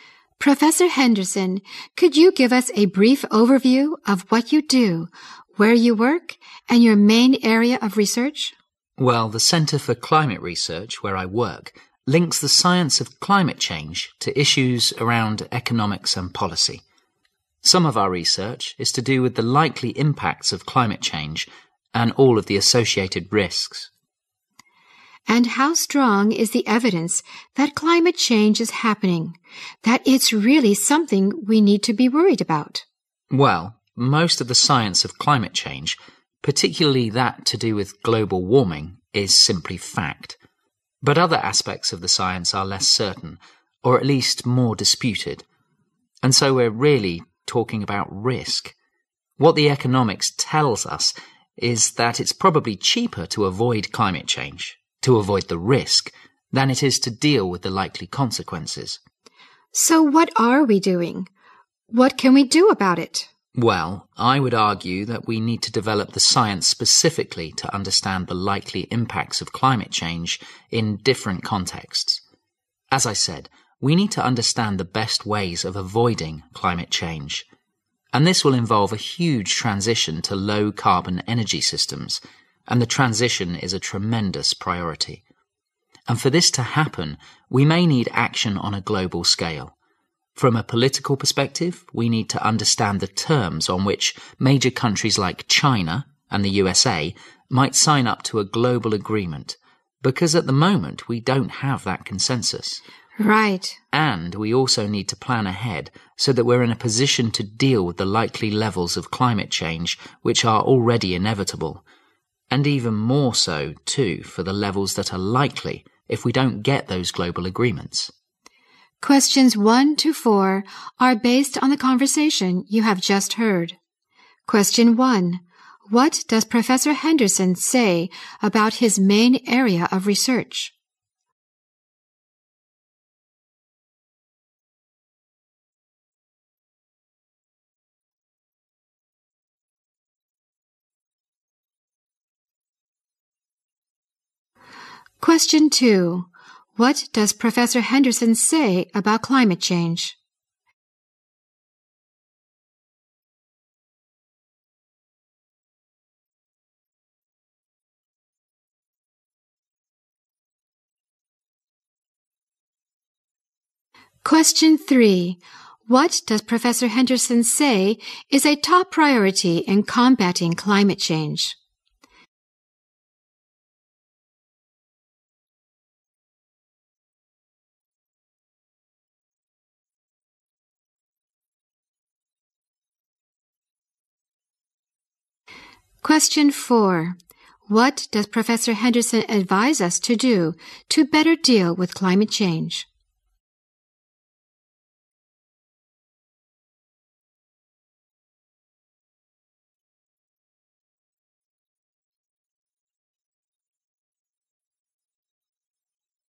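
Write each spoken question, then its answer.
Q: What does Professor Henderson say about his main area of research?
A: It links the science of climate change to economics and policy.

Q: What does Professor Henderson say is a top priority in combating climate change?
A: The transition to low-carbon energy systems.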